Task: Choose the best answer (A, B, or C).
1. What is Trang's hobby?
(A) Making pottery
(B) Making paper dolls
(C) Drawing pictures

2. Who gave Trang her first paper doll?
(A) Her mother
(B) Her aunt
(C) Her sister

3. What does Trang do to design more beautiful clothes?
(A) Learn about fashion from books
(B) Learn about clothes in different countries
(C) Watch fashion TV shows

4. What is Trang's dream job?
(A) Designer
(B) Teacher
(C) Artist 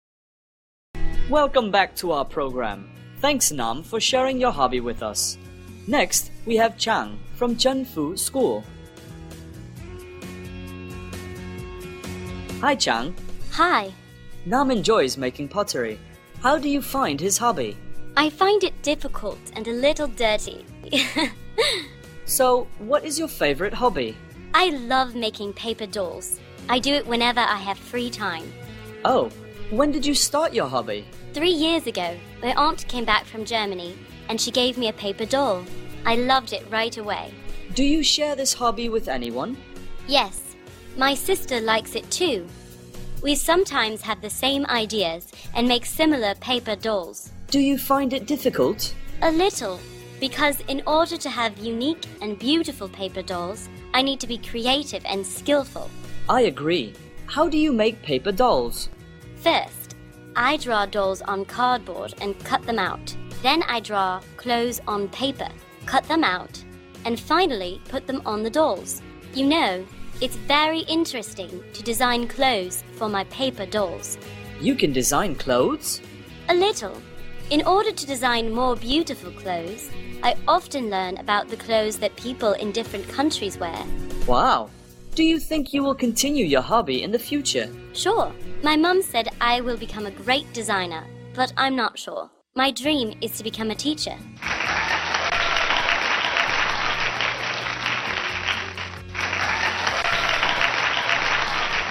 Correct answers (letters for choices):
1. B
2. B
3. B
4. B

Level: lớp 7